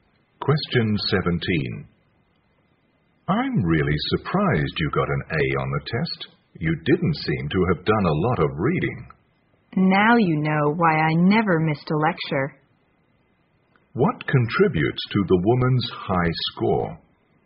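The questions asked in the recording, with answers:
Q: What contributes to the woman's high score?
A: Attending every lecture.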